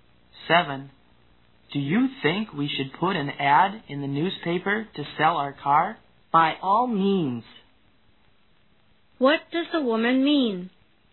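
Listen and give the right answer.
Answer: They should certainly put an ad in the newspaper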